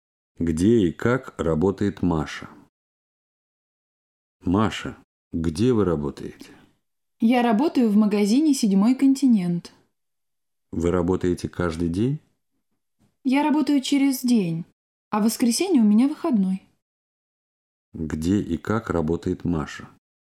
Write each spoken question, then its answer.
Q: Где и как работает Маша?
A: Маша работает в магазине «Седьмой континент». Она работает через день.